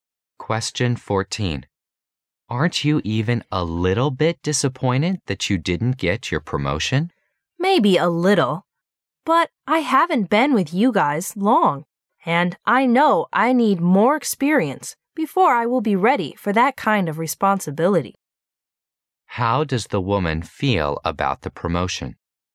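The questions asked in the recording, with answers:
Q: How does the woman feel about the promotion?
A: Only a little disappointed; she needs more experience first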